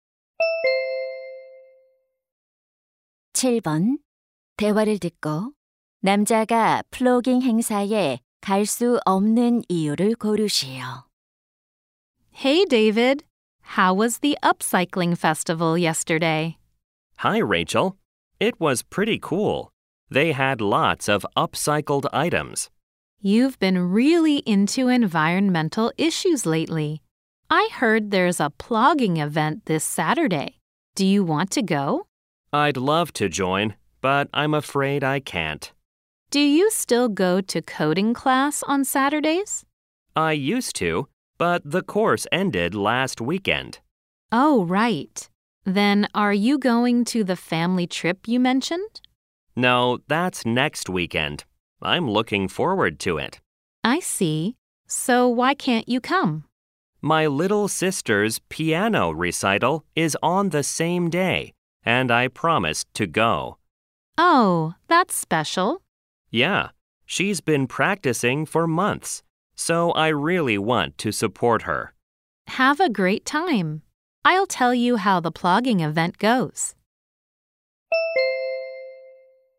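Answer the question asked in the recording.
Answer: 여동생의 피아노 연주회에 가야 해서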